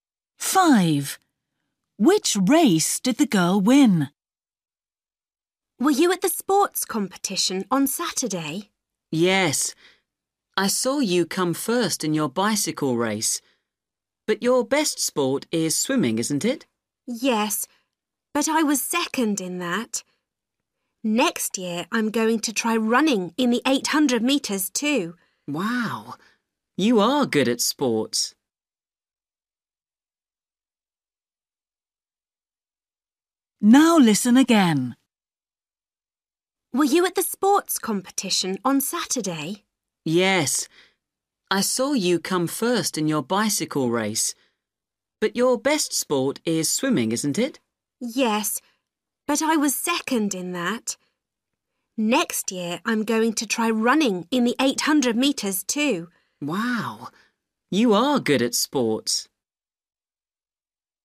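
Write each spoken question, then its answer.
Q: Which race did the girl win?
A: The bicycle race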